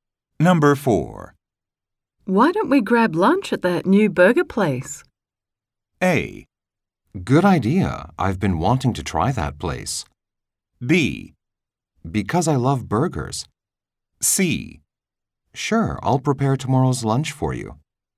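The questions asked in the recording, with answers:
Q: Why don't we grab lunch at that new burger place?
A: A: Good idea. I've been wanting to try that place.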